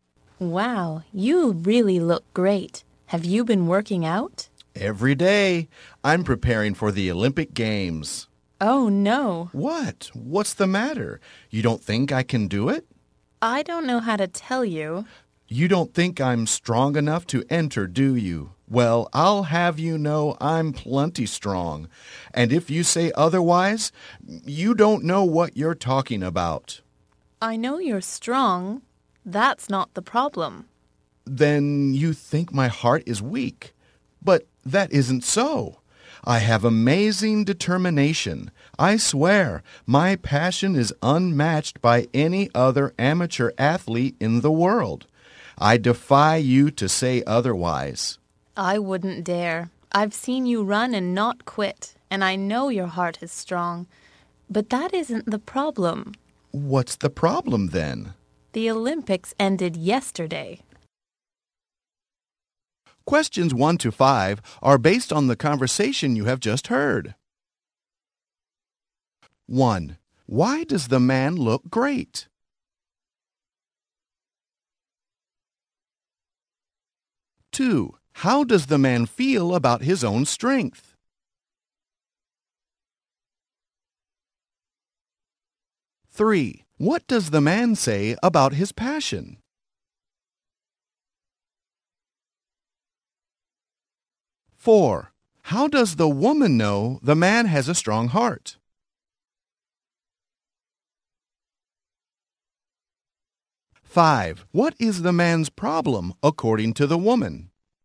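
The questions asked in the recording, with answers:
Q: Why does the man look great?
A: He works out every day to prepare for the Olympics

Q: How does the man feel about his own strength?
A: He thinks he is plenty strong

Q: What does the man say about his passion?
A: It is unmatched by any other amateur athlete

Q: How does the woman know the man has a strong heart?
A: She has seen him run and not quit

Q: What is the man's problem according to the woman?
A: The Olympics ended yesterday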